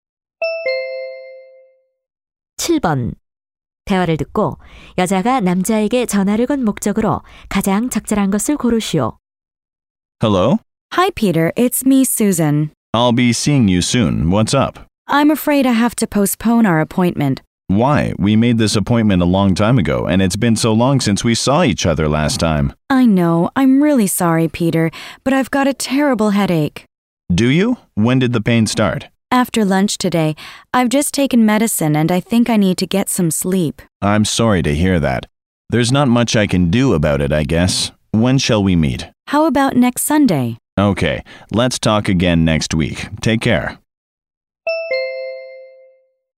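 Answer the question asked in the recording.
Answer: 약속을 연기하려고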